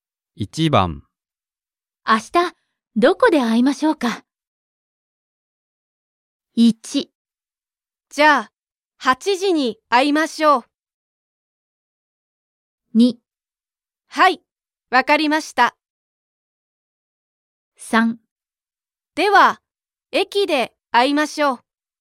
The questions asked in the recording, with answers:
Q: 明日、どこで会いましょうか?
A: Choice 3. では、駅で会いましょう。